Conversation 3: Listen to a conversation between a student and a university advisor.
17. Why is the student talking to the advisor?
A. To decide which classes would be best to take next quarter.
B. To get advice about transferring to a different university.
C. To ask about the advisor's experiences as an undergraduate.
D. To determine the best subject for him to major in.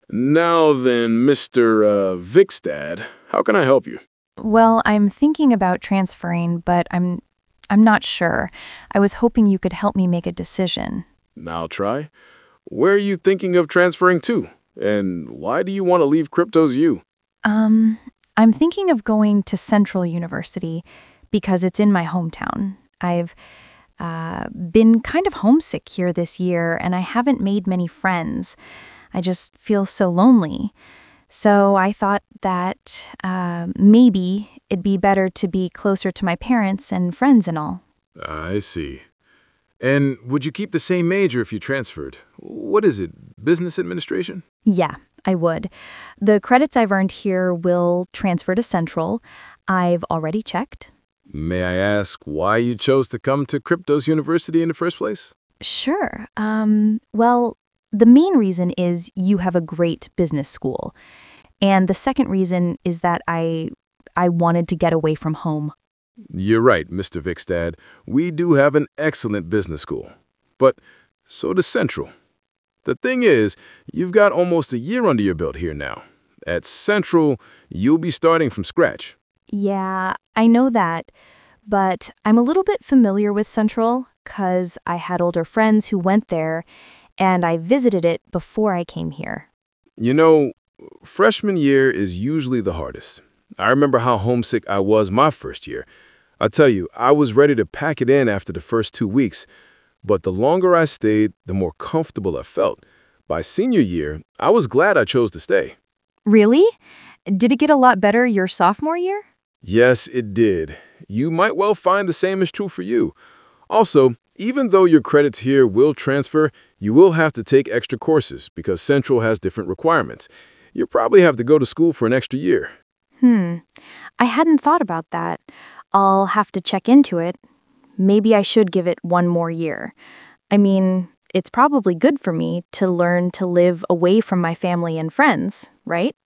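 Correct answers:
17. B

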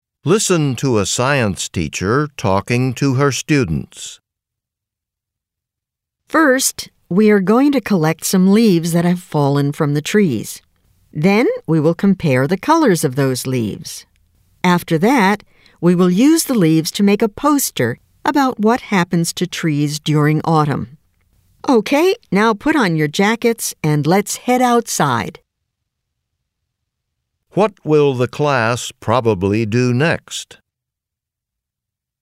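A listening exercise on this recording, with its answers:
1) What will the class probably do next?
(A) Design a poster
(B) Color the leaves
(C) Eat lunch outside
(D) Collect fallen leaves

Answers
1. D

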